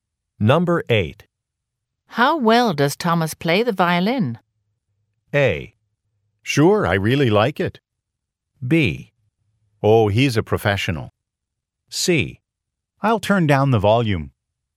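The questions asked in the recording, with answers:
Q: How well does Thomas play the violin?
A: B: Oh, he's a professional.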